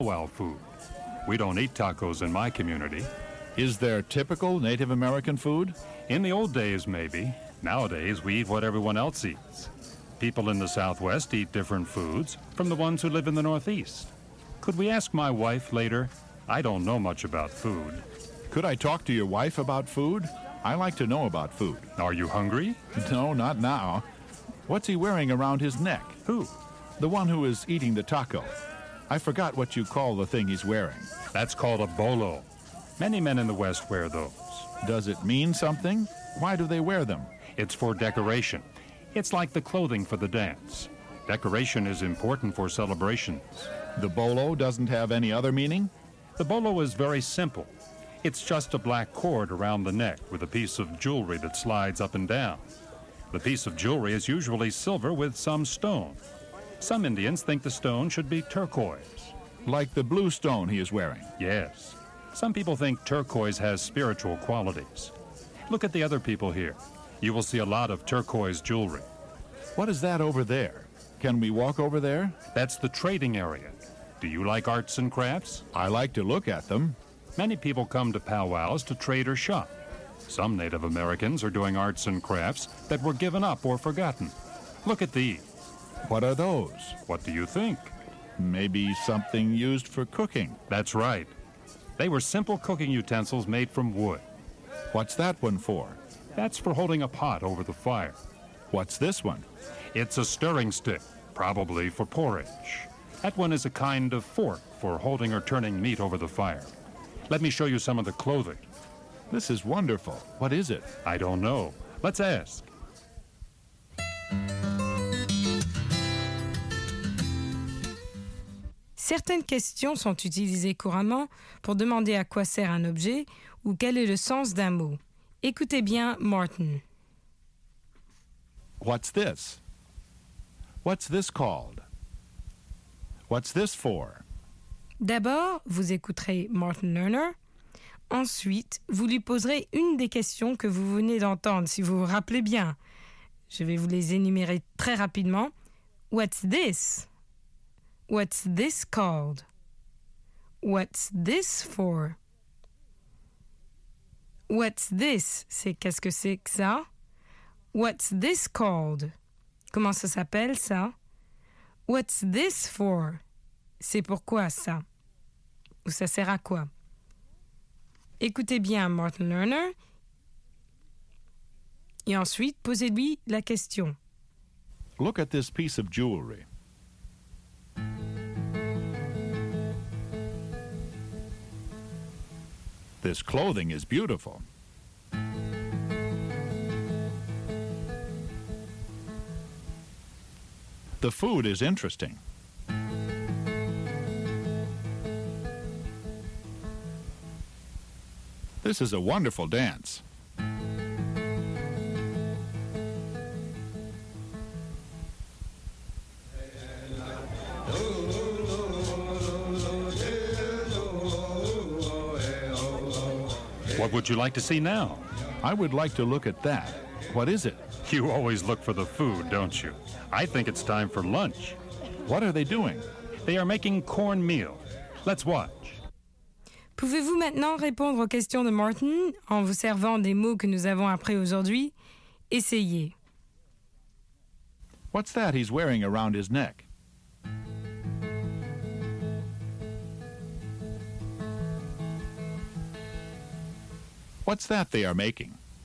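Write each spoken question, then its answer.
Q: What's that he's wearing around his neck?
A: A bolo

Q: What's that they are making?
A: Cornmeal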